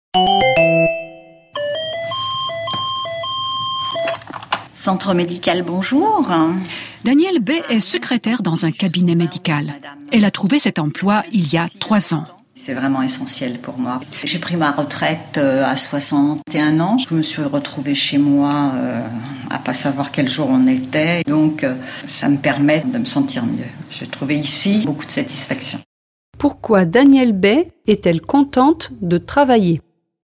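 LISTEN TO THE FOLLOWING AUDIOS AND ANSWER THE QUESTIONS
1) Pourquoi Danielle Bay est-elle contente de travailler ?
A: Parce que ça lui permet de se sentir mieux après sa retraite ; elle y trouve beaucoup de satisfaction.

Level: Levels B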